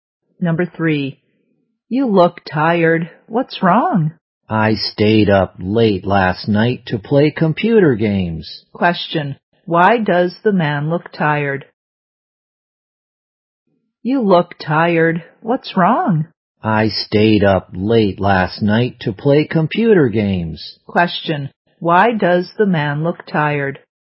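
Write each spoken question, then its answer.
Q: why does the man look tired?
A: He stayed up late playing computer games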